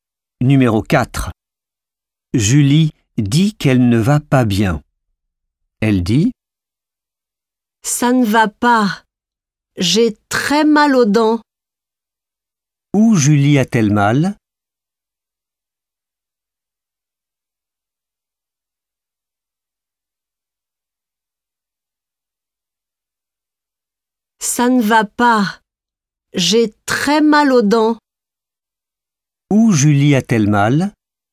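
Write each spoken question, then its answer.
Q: Où Julie a-t-elle mal?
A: Aux dents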